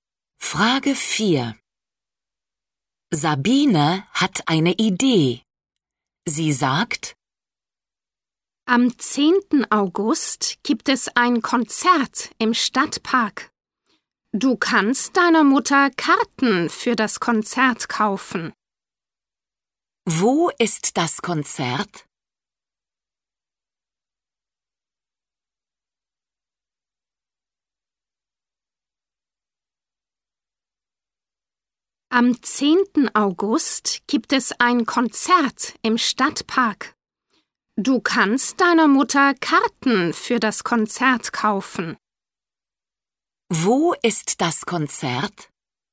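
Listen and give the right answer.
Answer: im Stadtpark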